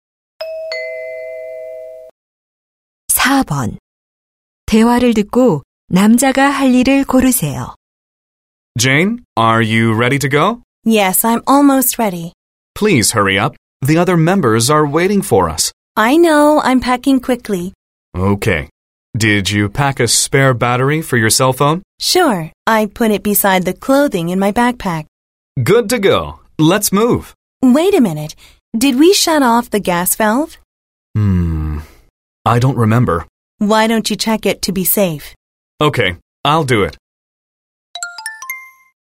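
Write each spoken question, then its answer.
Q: 대화를 듣고 남자가 할 일을 고르세요.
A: 가스 밸브 잠갔는지 확인하기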